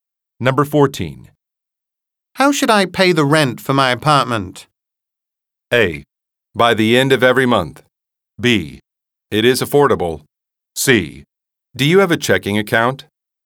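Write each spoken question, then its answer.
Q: How should I pay the rent for my apartment?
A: C: Do you have a checking account?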